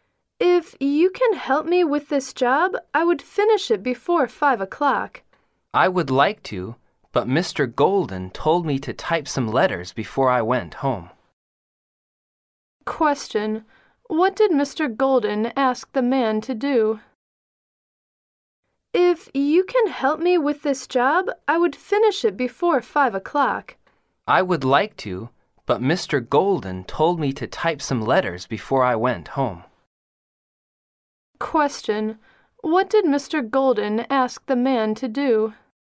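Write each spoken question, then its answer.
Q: what did Mr. Golden ask the man to do?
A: Type some letters before going home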